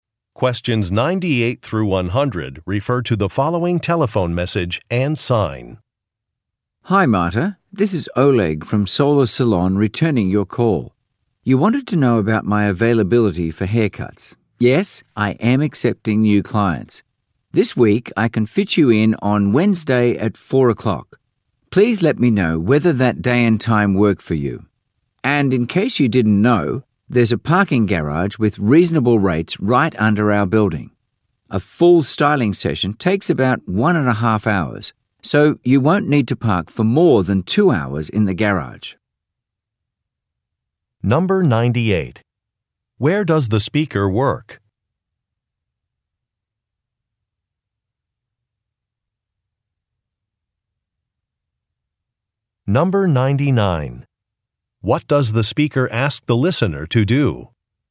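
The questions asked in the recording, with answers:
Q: Where does the speaker work?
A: At a hair salon (Solar Salon)

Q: What does the speaker ask the listener to do?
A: Confirm whether Wednesday at 4 o'clock works for the appointment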